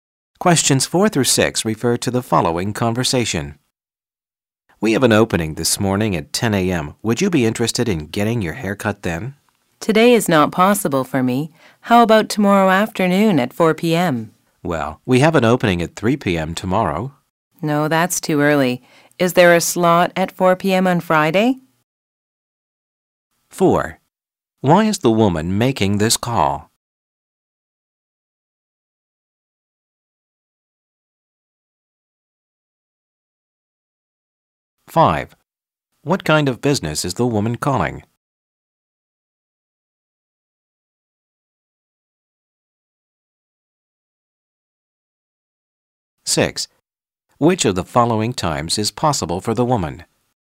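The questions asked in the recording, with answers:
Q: Why is the woman making this call?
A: To make a haircut appointment

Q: What kind of business is the woman calling?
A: A hair salon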